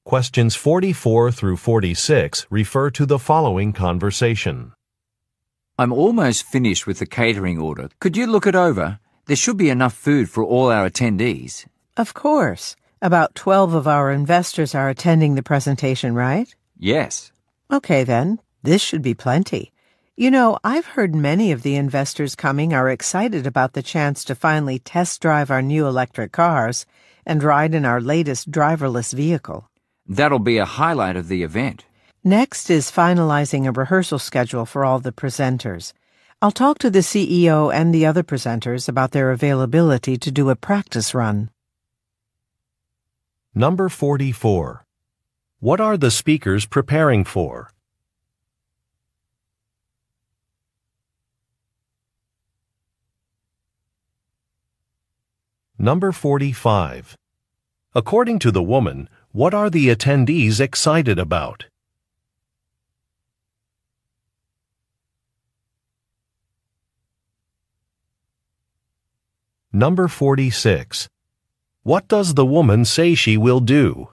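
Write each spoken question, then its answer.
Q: What are the speakers preparing for?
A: An investor presentation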